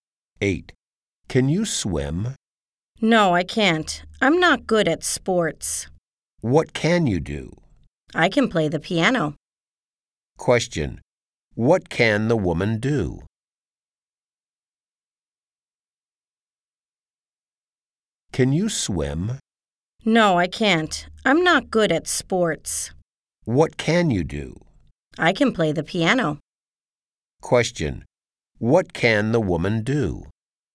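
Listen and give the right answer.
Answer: She can play the piano.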